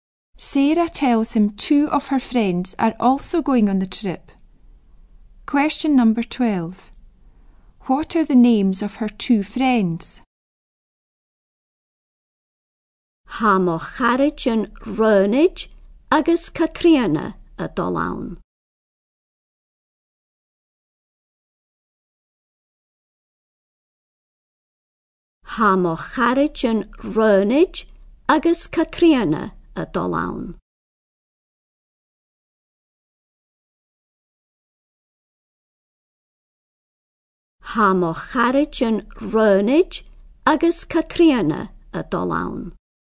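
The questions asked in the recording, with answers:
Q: What are the names of her two friends?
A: Ronnie and Catriona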